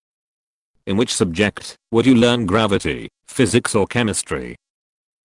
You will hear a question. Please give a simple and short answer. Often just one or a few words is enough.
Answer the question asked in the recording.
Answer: Physics